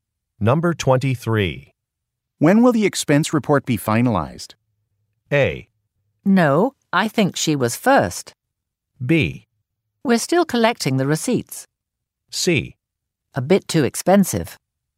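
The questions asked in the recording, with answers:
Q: When will the expense report be finalized?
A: B: We're still collecting the receipts.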